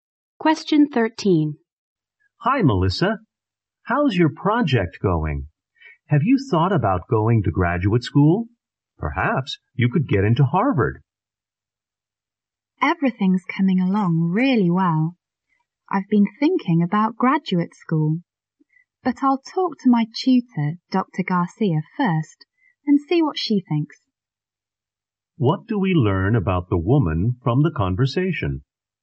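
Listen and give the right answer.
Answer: She will talk to her tutor before deciding on graduate school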